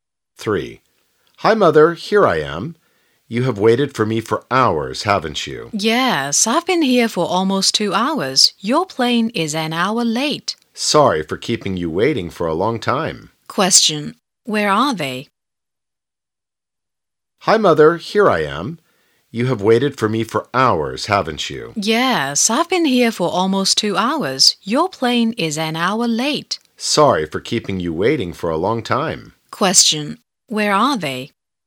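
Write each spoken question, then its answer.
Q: where are they?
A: At the airport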